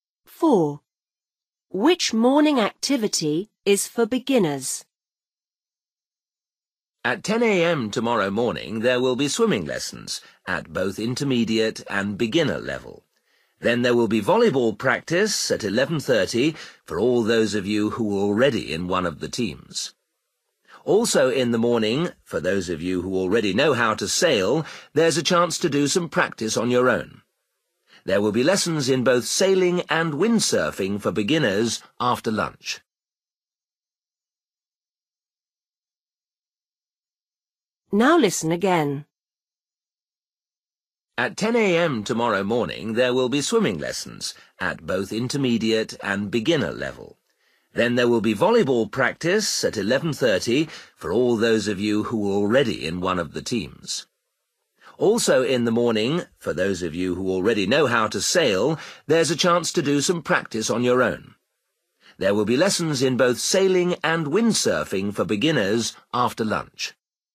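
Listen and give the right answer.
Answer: swimming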